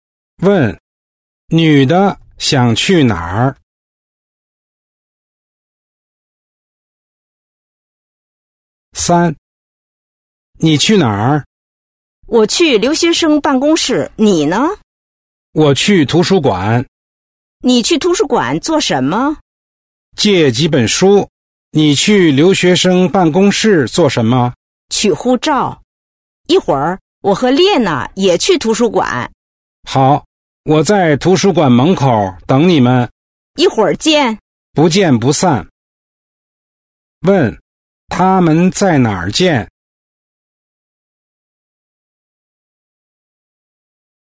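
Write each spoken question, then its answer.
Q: 他们在哪儿见?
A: 在图书馆门口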